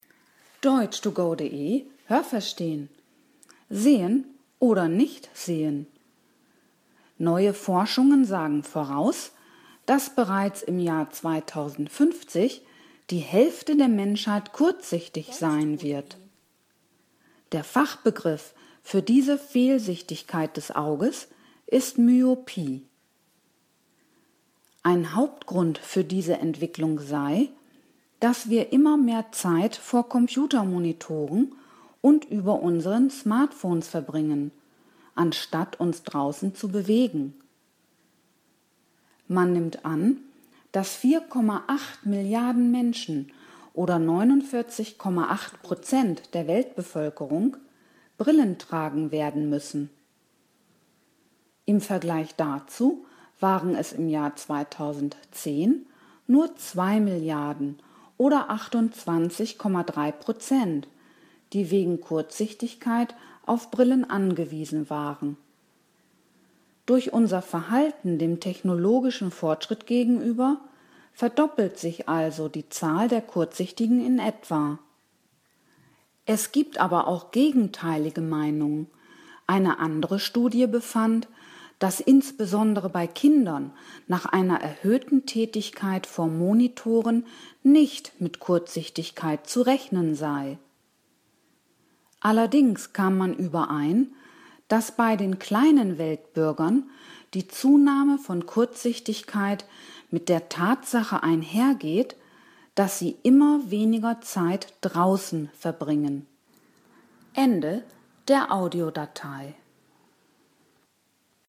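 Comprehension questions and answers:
Haben Sie das gehört? Stimmt diese Aussage?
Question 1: Bereits im Jahr 2050 wird die Hälfte der Menschheit nichts mehr sehen.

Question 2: Kurzsichtigkeit ist eine Fehlsichtigkeit des Auges.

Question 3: Ein Grund für das Ansteigen der Kurzsichtigkeit mag das vermehrte Schauen auf Computermonitore und Smartphones sein.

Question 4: Fast die Hälfte der Weltbevölkerung soll Mitte des Jahrhunderts Brillen tragen müssen.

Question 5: Im Jahr 2010 waren knapp über 30 % der Weltbevölkerung auf Brillen angewiesen.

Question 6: Die Forschung ist sich über alle Ursachen der Zunahme von Kurzsichtigkeit einig.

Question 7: Bei Kindern soll es keinen Zusammenhang zwischen der Zeit vor Monitoren und Kurzsichtigkeit geben.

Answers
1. Falsch
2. Richtig
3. Richtig
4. Richtig
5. Falsch
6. Falsch
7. Richtig

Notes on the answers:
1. Es wird vorausgesagt, dass sie dann kurzsichtig sein wird (= Entferntes nicht mehr gut sehen kann).
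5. Es waren knapp unter 30 %, nämlich 28,3 %.
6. Sie ist uneins bezüglich des Zusammenhangs von verbrachter Zeit vor Monitoren und dem Ansteigen von Kurzsichtigkeit.

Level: Hörtexte C (schwer)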